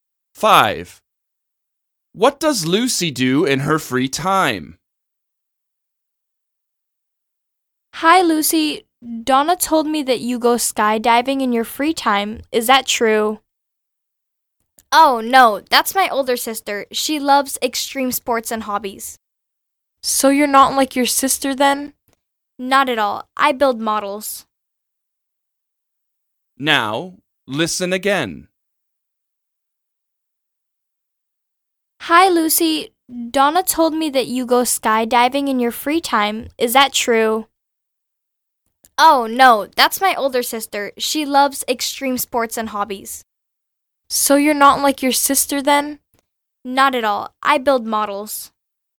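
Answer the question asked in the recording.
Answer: She builds models.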